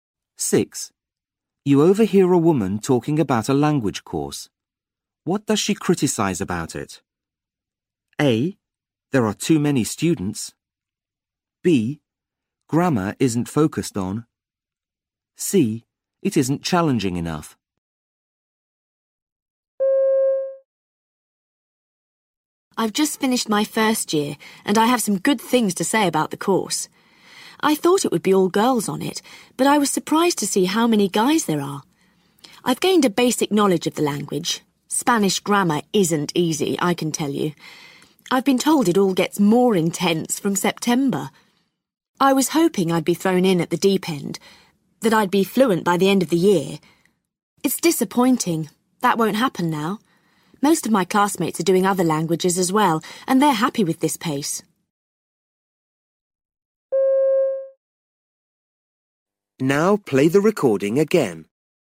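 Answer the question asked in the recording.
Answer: C: It isn't challenging enough.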